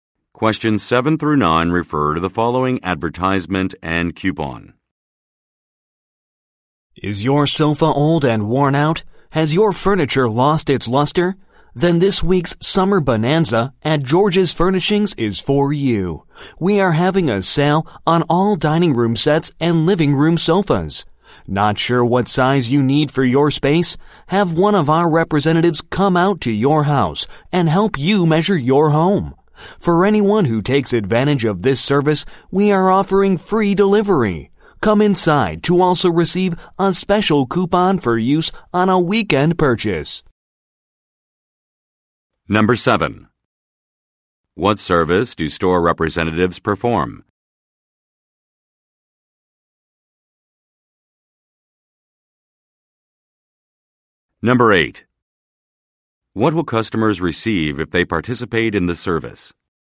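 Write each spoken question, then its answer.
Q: What service do store representatives perform?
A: Help measure customers' homes

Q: What will customers receive if they participate in the service?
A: Free delivery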